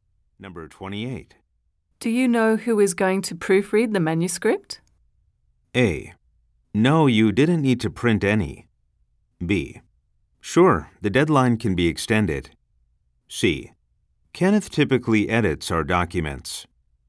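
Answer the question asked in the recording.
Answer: C: Kenneth typically edits our documents.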